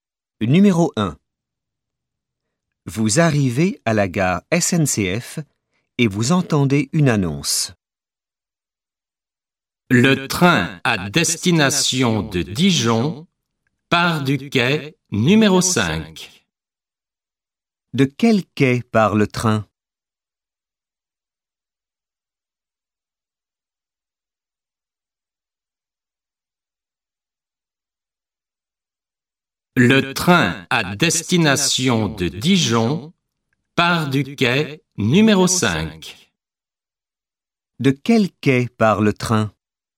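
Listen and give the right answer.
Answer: Du quai numéro 5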